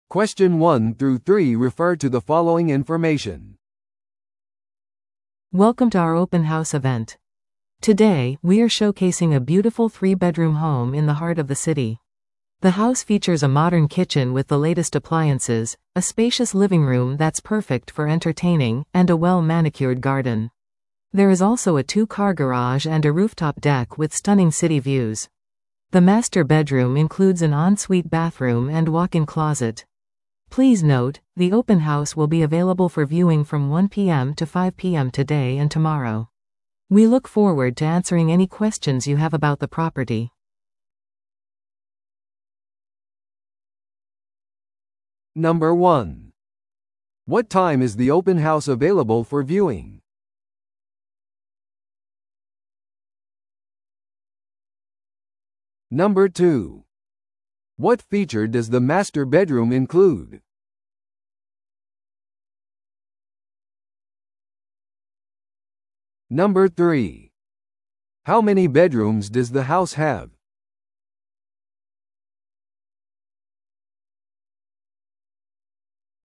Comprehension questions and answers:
Listen to the audio below and answer the questions.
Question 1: What time is the open house available for viewing?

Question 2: What feature does the master bedroom include?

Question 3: How many bedrooms does the house have?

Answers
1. B: From 1pm to 5pm
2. C: An en-suite bathroom and walk-in closet
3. B: Three

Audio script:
Welcome to our open house event! Today, we are showcasing a beautiful three-bedroom home in the heart of the city. The house features a modern kitchen with the latest appliances, a spacious living room that's perfect for entertaining, and a well-manicured garden. There is also a two-car garage and a rooftop deck with stunning city views. The master bedroom includes an en-suite bathroom and walk-in closet. Please note, the open house will be available for viewing from 1pm to 5pm today and tomorrow. We look forward to answering any questions you have about the property.